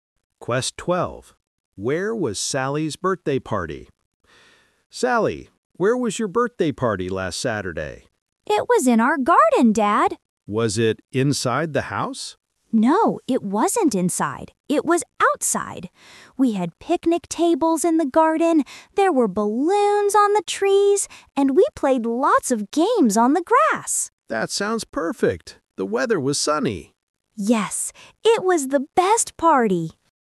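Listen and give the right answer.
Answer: In the garden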